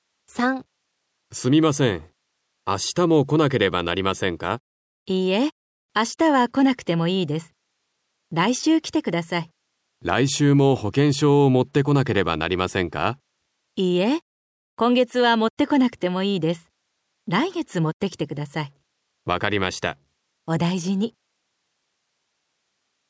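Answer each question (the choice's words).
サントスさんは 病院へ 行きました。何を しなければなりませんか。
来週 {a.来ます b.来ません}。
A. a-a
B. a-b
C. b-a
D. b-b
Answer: a-b

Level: 初級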